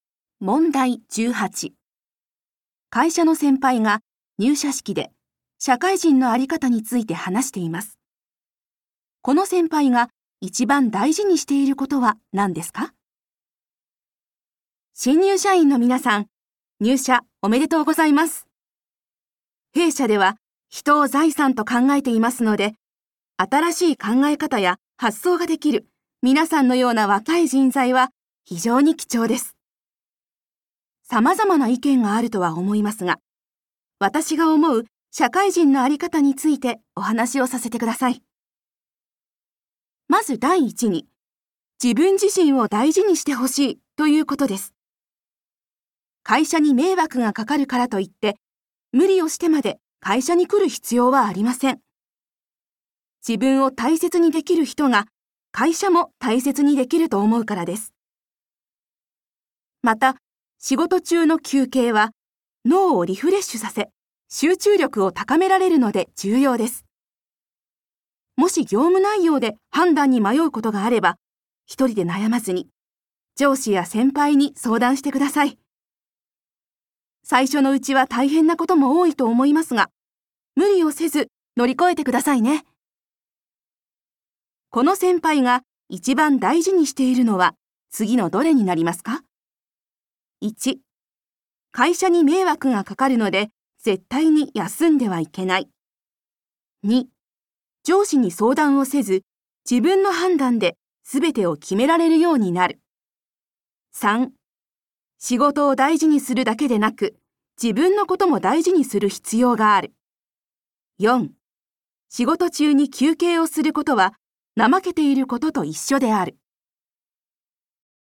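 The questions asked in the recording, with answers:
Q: この先輩が一番大事にしていることは何ですか?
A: 3: 仕事を大事にするだけでなく、自分のことも大事にする必要がある。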